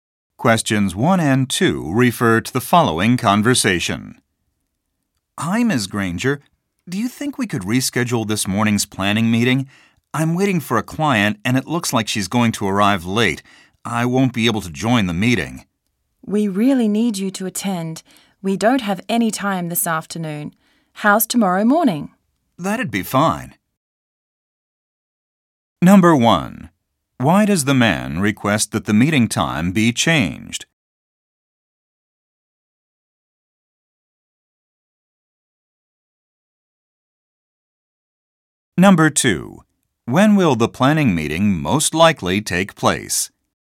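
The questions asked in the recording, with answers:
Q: Why does the man request that the meeting time be changed?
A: He is waiting for a client who will arrive late

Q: When will the planning meeting most likely take place?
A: Tomorrow morning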